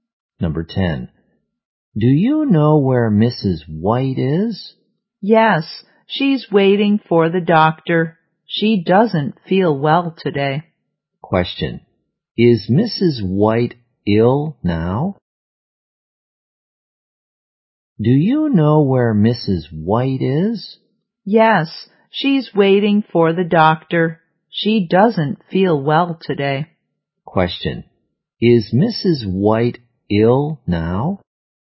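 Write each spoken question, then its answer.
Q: Is Mrs. White ill now?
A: Yes, she is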